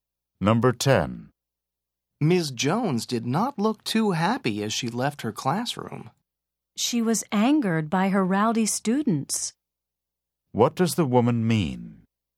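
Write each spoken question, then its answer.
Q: What does the woman mean?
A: Ms. Jones was angry because her students were rowdy.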